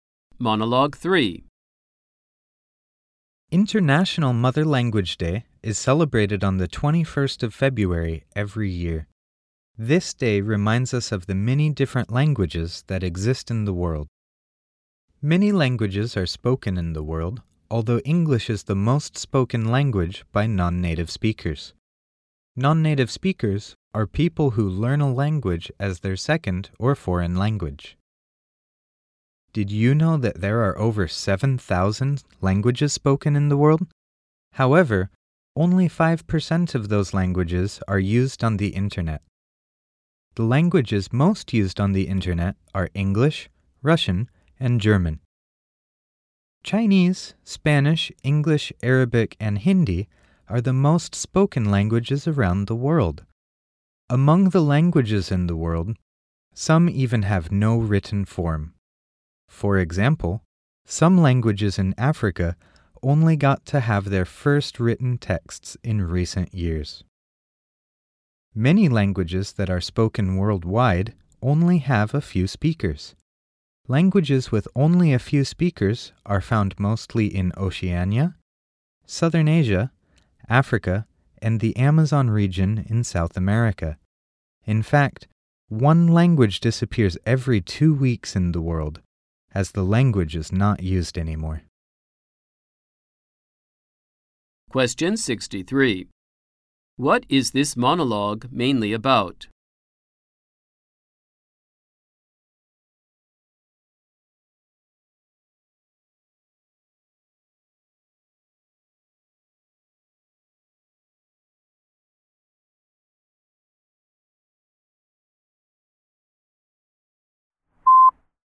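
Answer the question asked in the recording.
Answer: The many languages of the world (International Mother Language Day)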